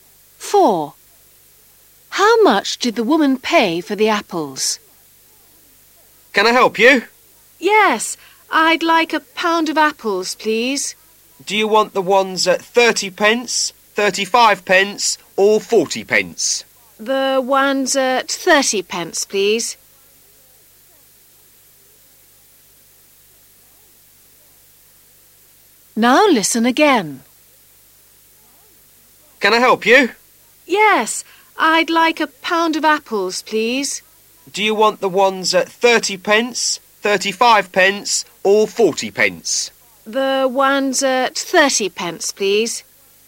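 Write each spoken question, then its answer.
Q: How much did the woman pay for the apples?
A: 30 pence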